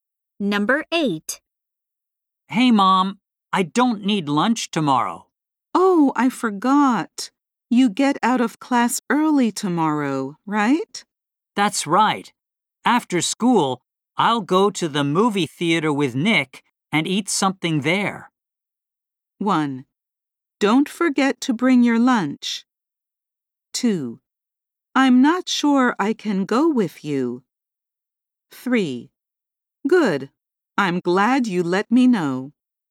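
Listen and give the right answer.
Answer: 3: Good. I'm glad you let me know.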